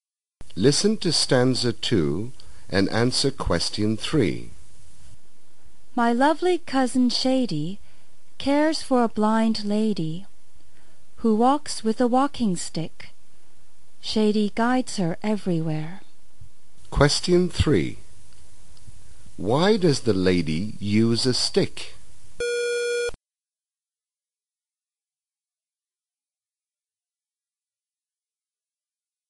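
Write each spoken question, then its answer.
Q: Why does the lady use a stick?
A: Because she is blind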